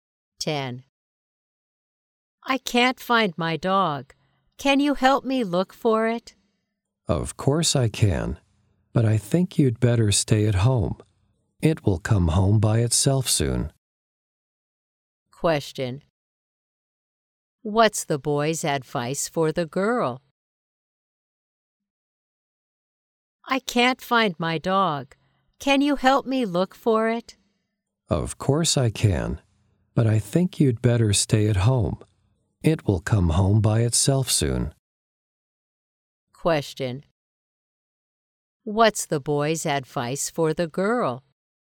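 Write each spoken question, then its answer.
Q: Question. What's the boy's advice for the girl?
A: To stay at home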